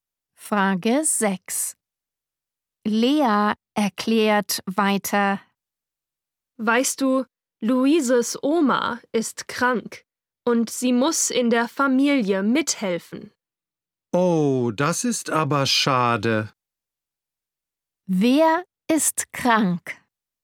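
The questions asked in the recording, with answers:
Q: Wer ist krank?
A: Luises Oma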